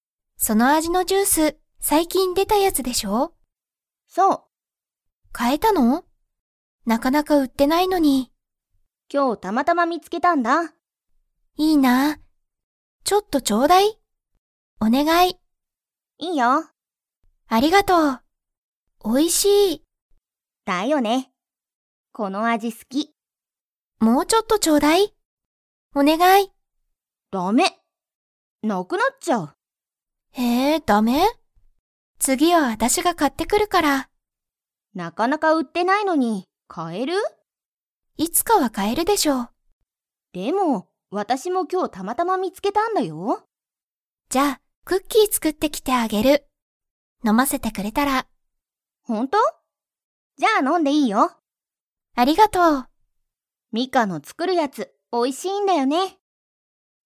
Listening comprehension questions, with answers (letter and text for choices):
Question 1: そのジュースは 。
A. たくさん売うってる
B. なかなか売うってない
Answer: B. なかなか売うってない

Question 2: ミカはスズに何なにを作つくってきてあげますか?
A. ジュース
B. ごはん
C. クッキー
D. ケーキ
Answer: C. クッキー

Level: Level 3